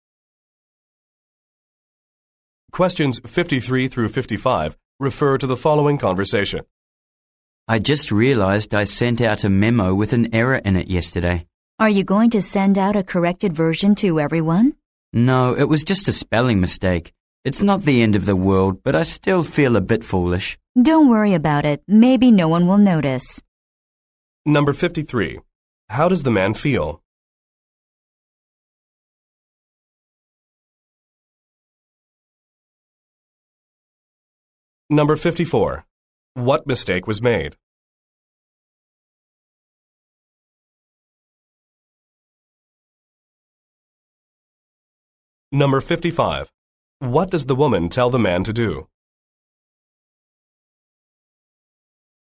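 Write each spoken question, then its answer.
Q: How does the man feel?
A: A bit foolish

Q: What mistake was made?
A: A spelling mistake in a memo

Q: What does the woman tell the man to do?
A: Not to worry about it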